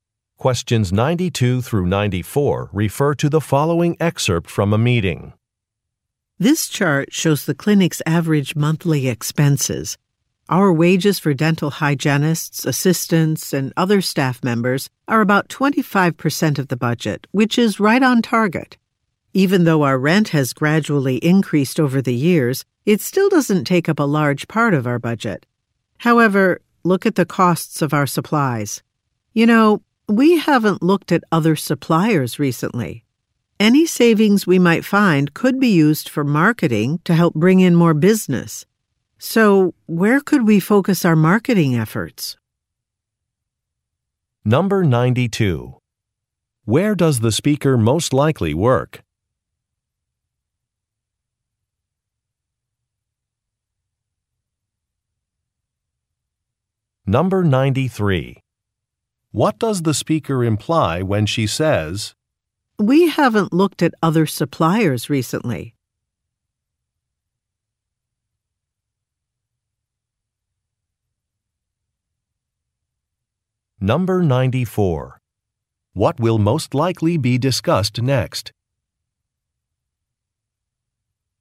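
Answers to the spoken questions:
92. A dental clinic
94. Where to focus marketing efforts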